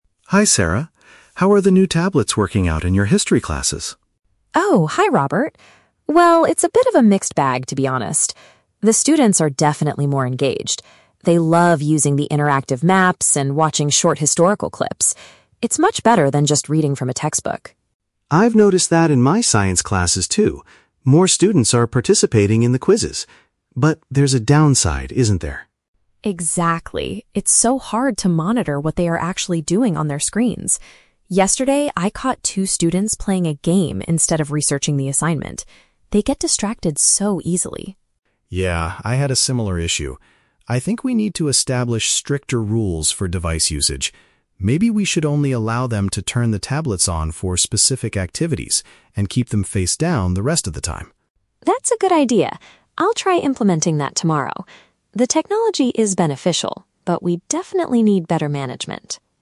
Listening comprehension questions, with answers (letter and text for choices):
Listen to the conversation between two teachers and choose the correct answer (A, B, or C) for each question.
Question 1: What is the main benefit of the tablets according to Sarah?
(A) Students can complete their homework much faster.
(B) Students show more interest in the learning materials.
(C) Students are participating more in the science quizzes.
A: (B) Students show more interest in the learning materials.

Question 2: What problem did Sarah experience with her students recently?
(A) They were doing non-academic activities on their devices.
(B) They forgot to bring their history textbooks to class.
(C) They refused to follow the new rules for tablet usage.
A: (A) They were doing non-academic activities on their devices.

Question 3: What does Robert suggest they do to solve the distraction issue?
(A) Confiscate the tablets from students who do not focus.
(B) Only use the tablets for watching short educational videos.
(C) Create firmer regulations for when the devices can be active.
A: (C) Create firmer regulations for when the devices can be active.

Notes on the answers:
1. Sarah says her students are "definitely more engaged" and "love using the interactive maps". Option B uses the phrase "show more interest" as a synonym for "engaged". The Trap: Option (C) is a trap. "Participating in the quizzes" is mentioned in the audio, but it happens in Robert's science classes, not Sarah's history classes. Option (A) is a plausible benefit of technology but is not mentioned.
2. Sarah mentions she caught students "playing a game instead of researching the assignment". Option A paraphrases "playing a game" as "non-academic activities". The Trap: Option (B) contains the word "textbook". However, Sarah only compares the tablets to textbooks ("much better than just reading from a textbook"); she doesn't say the students forgot them. Option (C) mentions "rules", but Robert hasn't even suggested the new rules yet.
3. Robert suggests they need to "establish stricter rules for device usage" and only turn them on "for specific activities". Option C perfectly paraphrases this idea. The Trap: Option (B) mentions "watching short educational videos". While videos ("historical clips") are mentioned earlier by Sarah as an activity, they are not Robert's solution to the problem. Option (A) is a logical teacher's reaction but is never mentioned in the conversation.

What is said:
Robert: Hi Sarah. How are the new tablets working out in your history classes?
Sarah: Oh, hi Robert. Well, it's a bit of a mixed bag, to be honest. The students are definitely more engaged. They love using the interactive maps and watching short historical clips. It's much better than just reading from a textbook.
Robert: I've noticed that in my science classes too. More students are participating in the quizzes. But there's a downside, isn't there?
Sarah: Exactly. It's so hard to monitor what they are actually doing on their screens. Yesterday, I caught two students playing a game instead of researching the assignment. They get distracted so easily.
Robert: Yeah, I had a similar issue. I think we need to establish stricter rules for device usage. Maybe we should only allow them to turn the tablets on for specific activities, and keep them face down the rest of the time.
Sarah: That's a good idea. I'll try implementing that tomorrow. The technology is beneficial, but we definitely need better management.